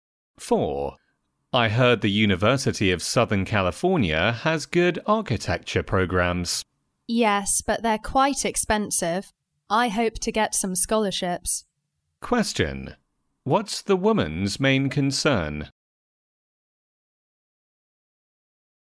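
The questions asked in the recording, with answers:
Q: What's the woman's main concern?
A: The high cost of the program; she hopes to get scholarships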